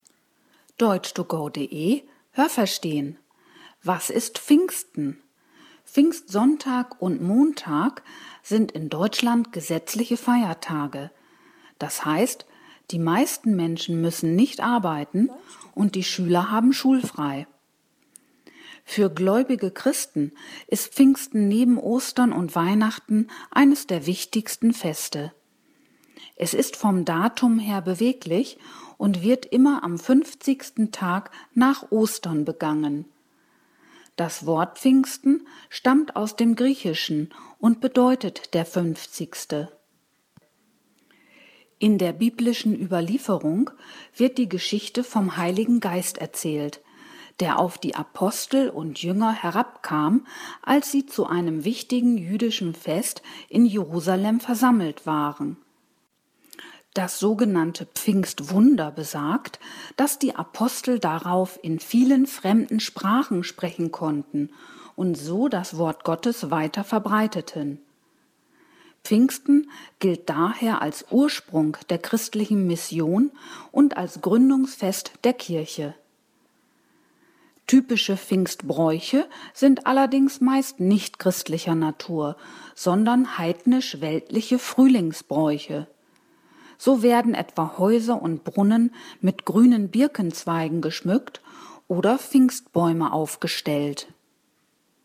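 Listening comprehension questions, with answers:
Welches Adjektiv passt?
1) Pfingstsonntag und -montag sind in Deutschland _____ Feiertage.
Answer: gesetzliche

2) Für _____ Christen ist es eines der wichtigsten Feste.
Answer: gläubige

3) Pfingsten ist vom Datum her _____ .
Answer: beweglich

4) Die Apostel waren zu einem wichtigen _____ Fest versammelt.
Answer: jüdischen

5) Typische Pfingsbräuche sind _____ und weltlich.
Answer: heidnisch

Haben Sie das gehört? Stimmt diese Aussage?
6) Pfingsten ist für Christen das wichtigste Fest.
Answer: Falsch

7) Das Pfingstfest ist immer 15 Wochen nach Ostern.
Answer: Falsch

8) In der Bibel spielt der Heilige Geist eine zentrale Rolle in Bezug auf das Pfingstfest.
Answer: Richtig

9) Durch das Pfingswunder konnten die Apostel viele fremde Sprachen sprechen.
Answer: Richtig

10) Die Apostel verbreiteten das Wort Gottes in vielen Sprachen und begründeten so die christliche Mission.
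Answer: Richtig

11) Pfingsten gilt als Gründungsfest der kirchlichen Feiertage.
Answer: Falsch

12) Die zu Pfingsten typischen Bräuche wurden von Christen eingeführt.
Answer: Falsch

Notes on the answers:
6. Es ist neben Ostern und Weihnachten eines der wichtigsten Feste.
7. Es ist am fünfzigsten Tag nach Ostern.
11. Es gilt als Gründungsfest der Kirche.
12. Sie sind heidnisch-weltlicher Natur und mit anderen Frühlingsbräuchen vergleichbar.

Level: B (mittel)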